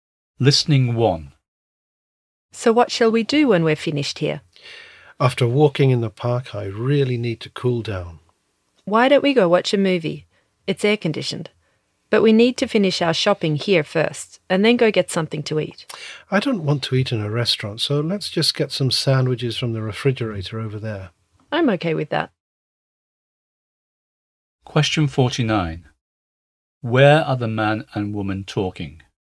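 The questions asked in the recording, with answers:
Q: Where are the man and woman talking?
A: In a supermarket (food store)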